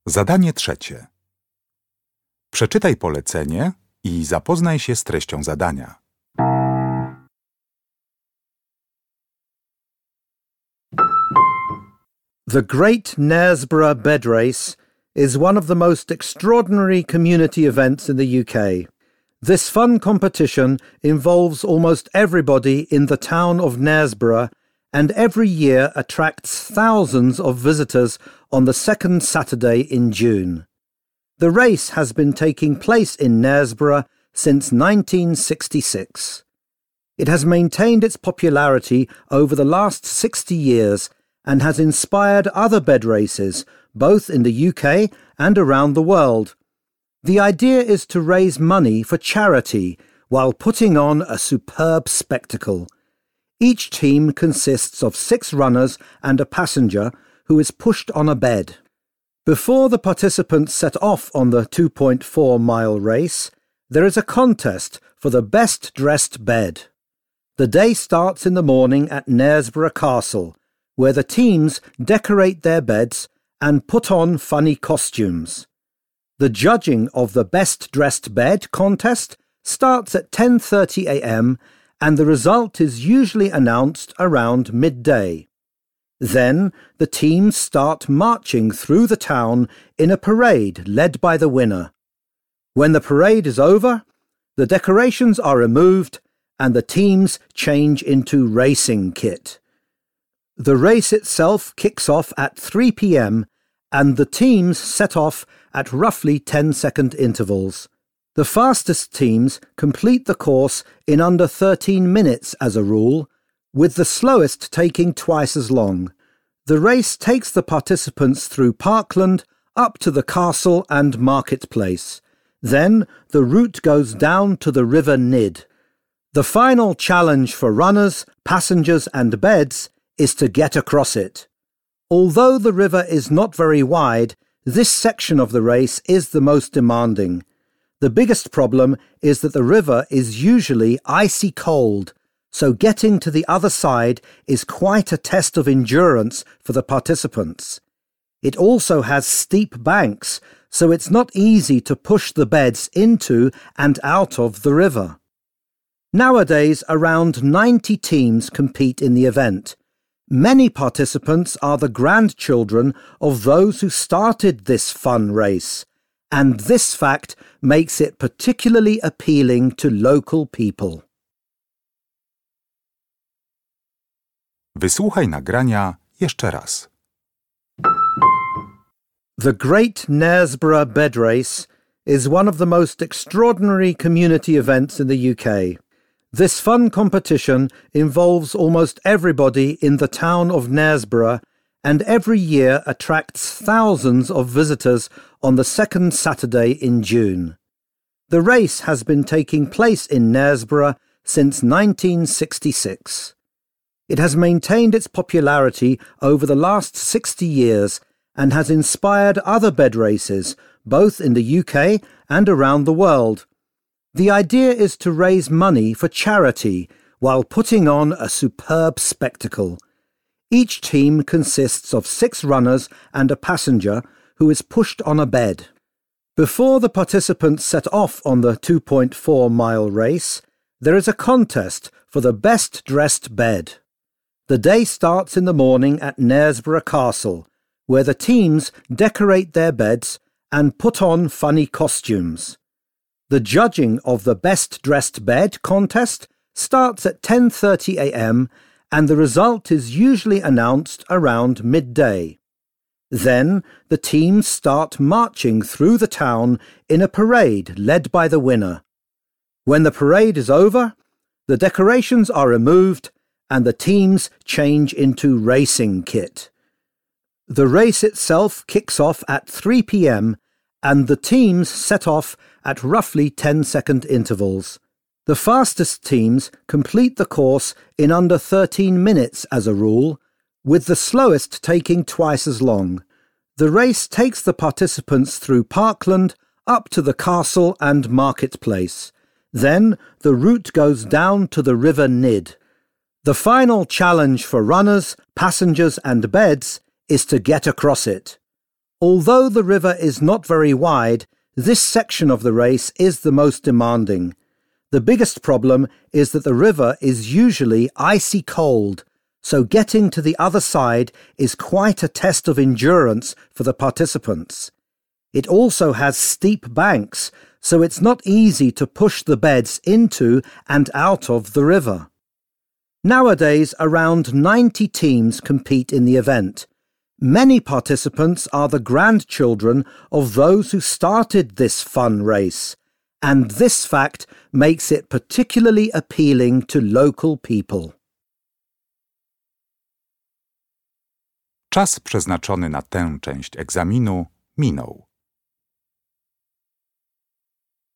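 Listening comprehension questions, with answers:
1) The bed race in Knaresborough was first held and has been popular ever since.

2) Straight after the contest for the best-decorated bed, . The winning team leads the way.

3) Teams leave the starting line of the race approximately every .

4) Crossing the river is the most difficult part of the race mainly because of . Getting the beds in and out of the river is also a challenge.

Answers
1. in 1966
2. the teams march through the town in a parade
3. 10 seconds
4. the icy cold water

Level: Poziom: rozszerzony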